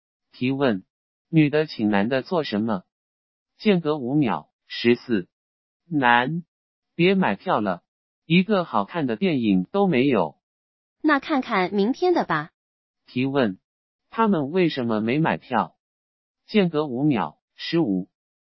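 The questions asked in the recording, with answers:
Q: 提问,他们为什么没买票?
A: 没有好看的电影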